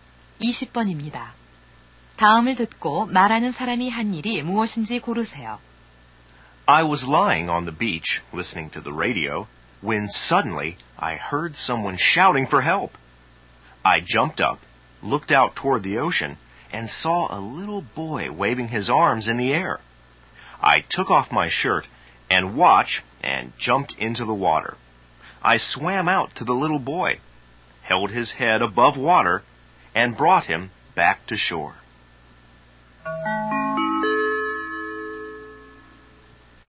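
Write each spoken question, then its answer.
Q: 다음을 듣고 말하는 사람이 한 일이 무엇인지 고르세요.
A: 물에 빠진 소년을 구함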